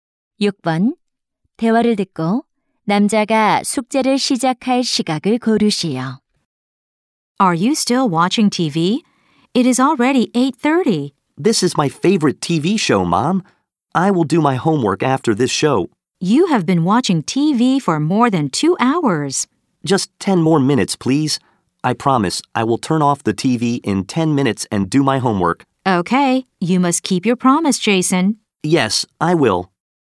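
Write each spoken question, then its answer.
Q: 대화를 듣고 남자가 숙제를 시작할 시각을 고르시오.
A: 8시 40분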